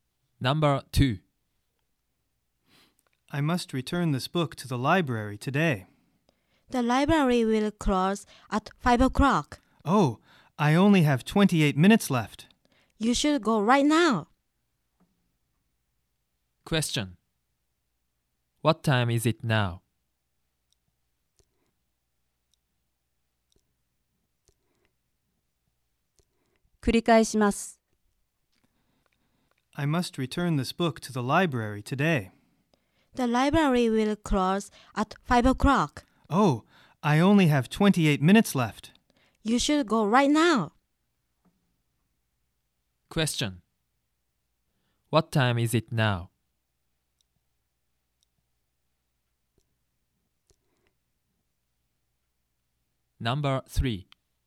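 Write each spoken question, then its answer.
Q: What time is it now?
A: 4:32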